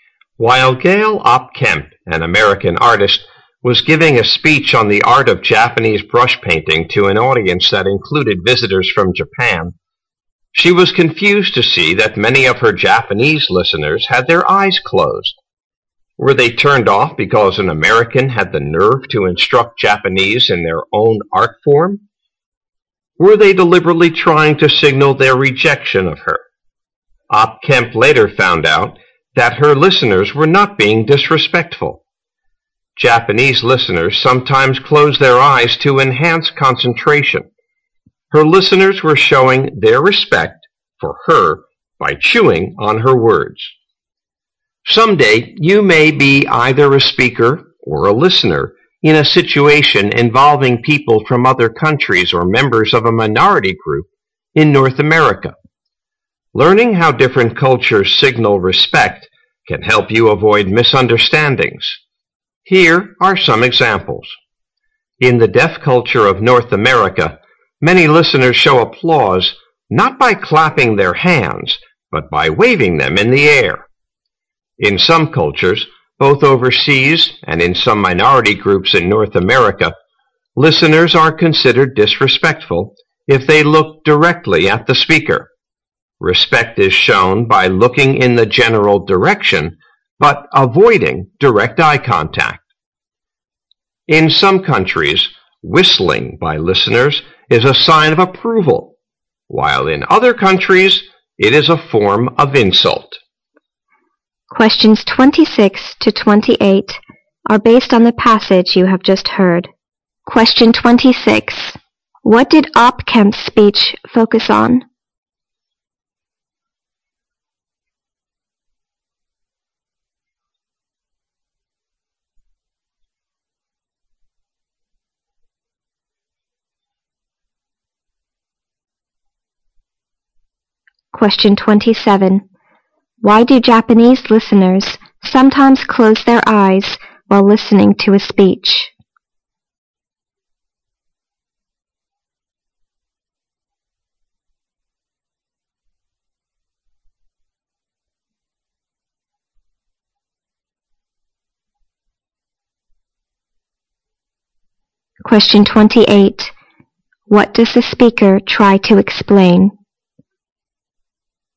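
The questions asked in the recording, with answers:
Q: What did Opkemp's speech focus on?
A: The art of Japanese brush painting

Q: Why do Japanese listeners sometimes close their eyes while listening to a speech?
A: To enhance concentration

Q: What does the speaker try to explain?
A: How different cultures signal respect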